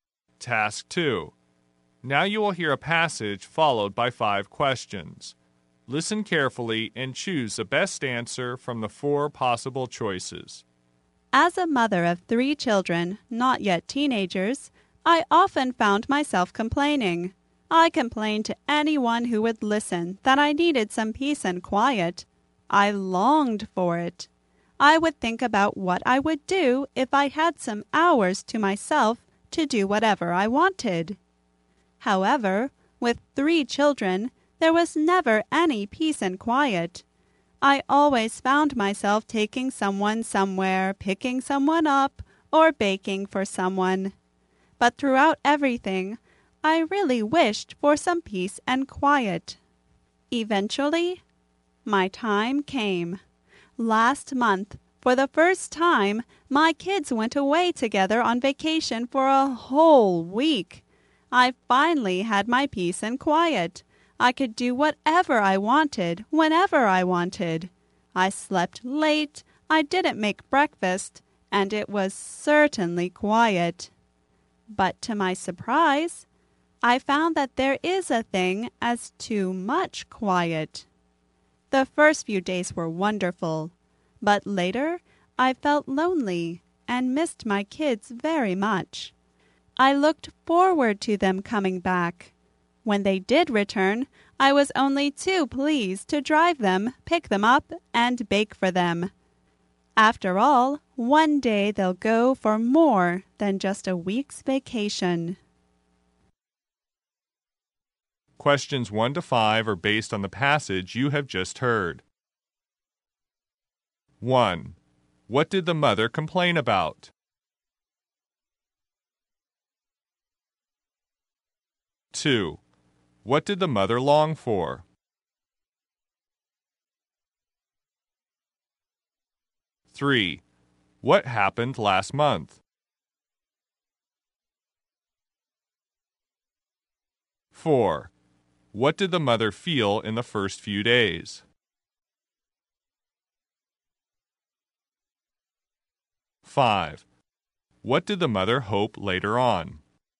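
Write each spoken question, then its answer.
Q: What did the mother complain about?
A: She never had any peace and quiet

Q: What did the mother long for?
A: Some peace and quiet

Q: What happened last month?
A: Her kids went away on vacation for a week

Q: What did the mother feel in the first few days?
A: They were wonderful

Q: What did the mother hope later on?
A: That her kids would come back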